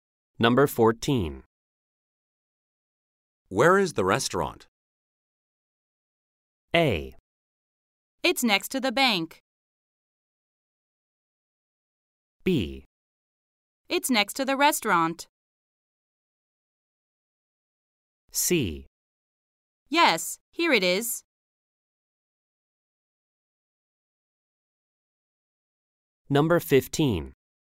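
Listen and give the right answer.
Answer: A: It's next to the bank.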